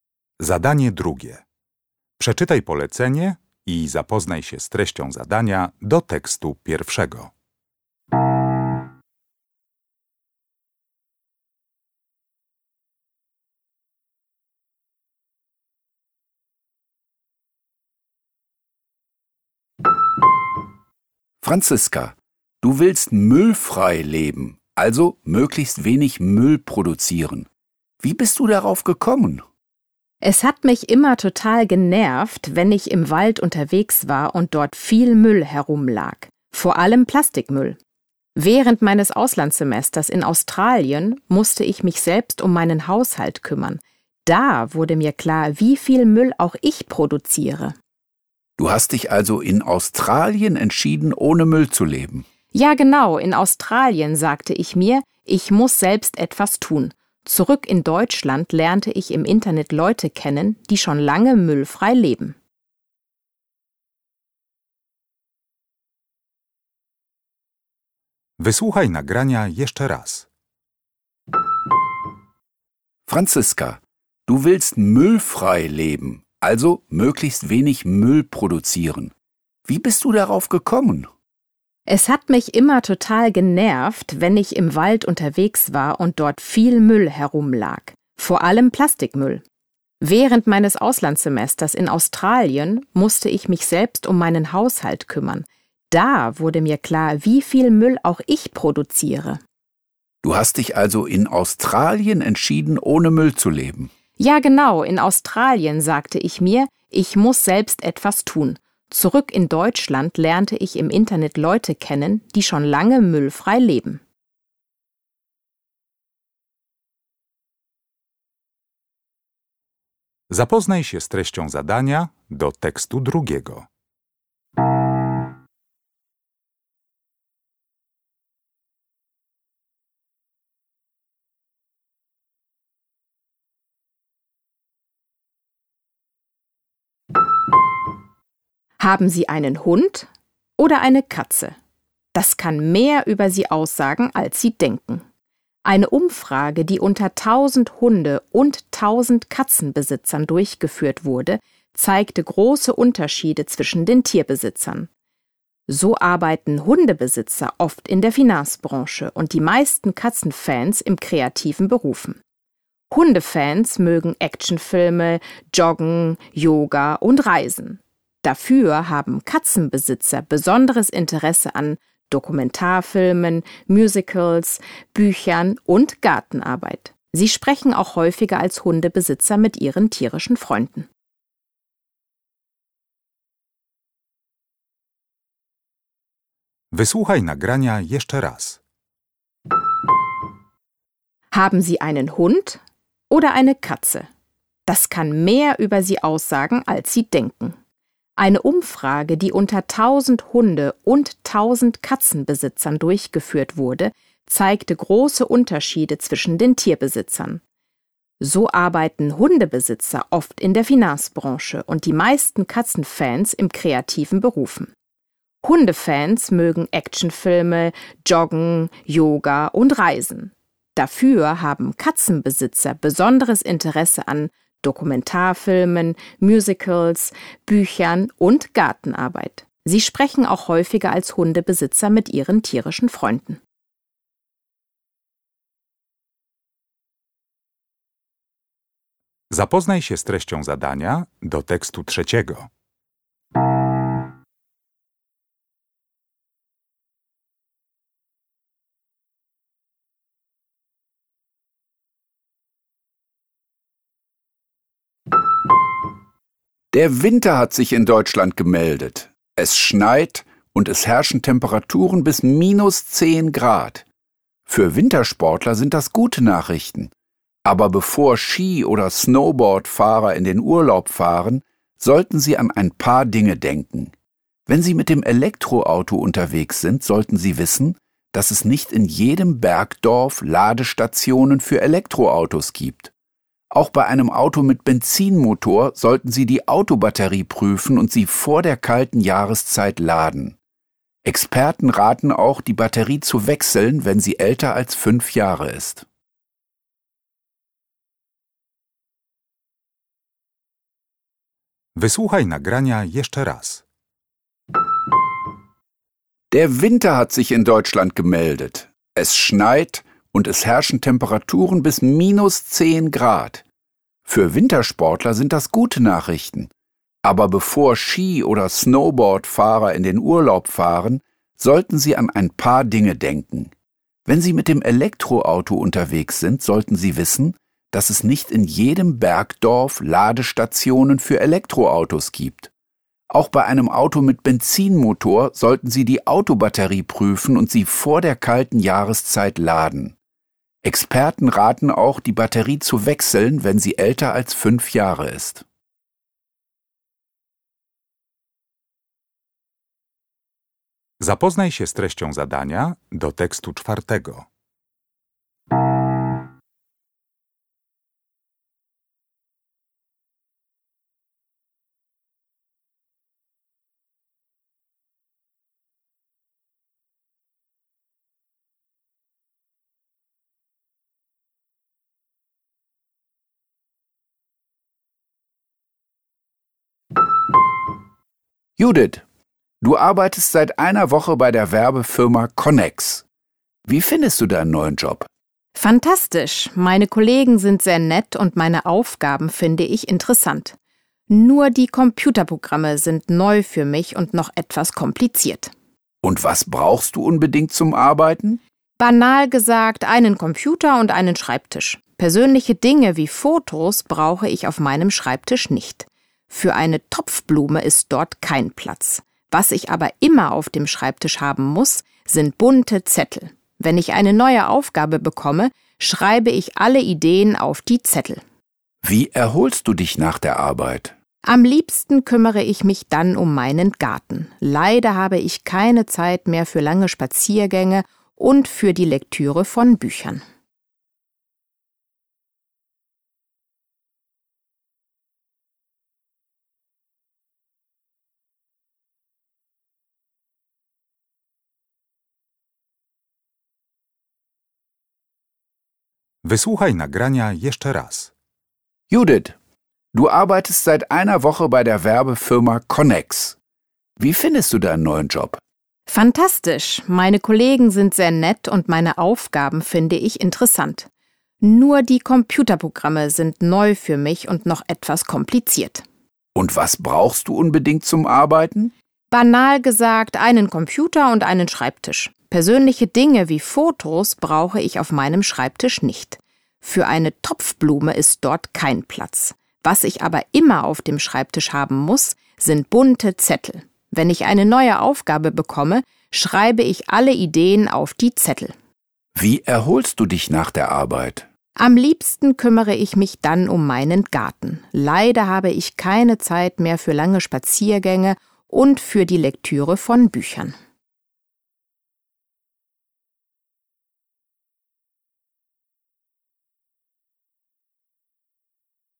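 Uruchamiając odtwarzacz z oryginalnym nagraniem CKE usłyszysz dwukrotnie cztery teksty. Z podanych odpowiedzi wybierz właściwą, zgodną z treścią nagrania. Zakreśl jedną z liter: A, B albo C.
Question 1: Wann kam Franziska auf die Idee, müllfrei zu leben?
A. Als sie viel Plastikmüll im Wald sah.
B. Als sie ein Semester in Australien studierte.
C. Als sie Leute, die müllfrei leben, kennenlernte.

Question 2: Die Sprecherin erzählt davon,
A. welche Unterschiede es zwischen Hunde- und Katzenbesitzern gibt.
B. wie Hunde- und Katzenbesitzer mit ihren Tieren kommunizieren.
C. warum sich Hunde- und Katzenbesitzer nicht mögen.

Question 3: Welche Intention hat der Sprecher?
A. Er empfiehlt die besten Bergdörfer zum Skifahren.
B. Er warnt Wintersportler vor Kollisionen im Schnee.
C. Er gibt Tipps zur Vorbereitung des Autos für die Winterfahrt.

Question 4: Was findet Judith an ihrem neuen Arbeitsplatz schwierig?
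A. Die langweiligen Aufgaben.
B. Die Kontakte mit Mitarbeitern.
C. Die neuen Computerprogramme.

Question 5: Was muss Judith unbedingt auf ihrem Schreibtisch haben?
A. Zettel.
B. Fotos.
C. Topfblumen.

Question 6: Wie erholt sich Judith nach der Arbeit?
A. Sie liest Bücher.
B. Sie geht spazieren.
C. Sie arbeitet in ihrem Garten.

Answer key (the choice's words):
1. Als sie ein Semester in Australien studierte.
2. welche Unterschiede es zwischen Hunde- und Katzenbesitzern gibt.
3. Er gibt Tipps zur Vorbereitung des Autos für die Winterfahrt.
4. Die neuen Computerprogramme.
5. Zettel.
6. Sie arbeitet in ihrem Garten.

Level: Poziom: podstawowy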